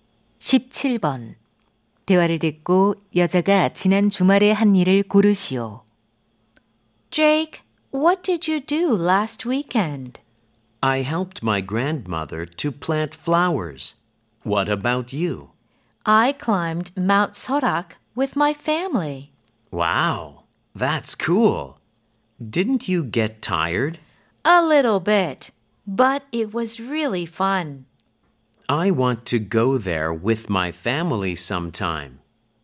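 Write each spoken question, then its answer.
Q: 대화를 듣고 여자가 지난 주말에 한 일을 고르시오.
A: 가족과 설악산 등산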